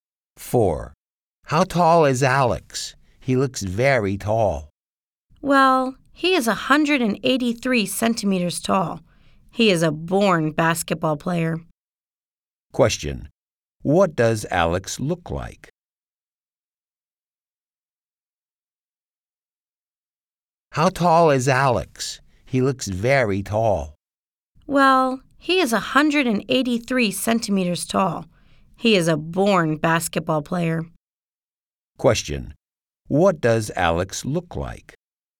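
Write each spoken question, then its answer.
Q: What does Alex look like?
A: He is very tall (183 centimeters).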